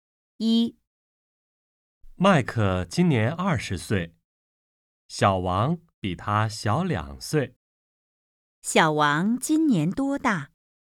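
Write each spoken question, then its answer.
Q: 小王今年多大?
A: 18岁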